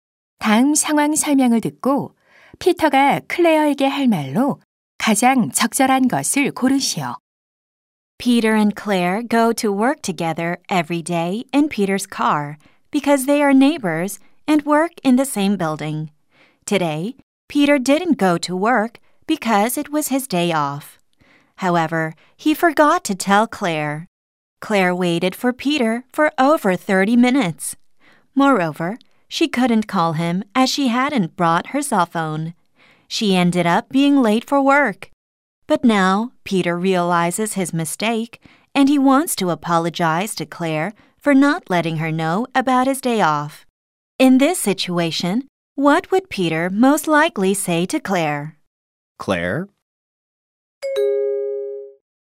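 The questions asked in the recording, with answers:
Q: In this situation, what would Peter most likely say to Claire?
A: I'm sorry I didn't tell you about my day off.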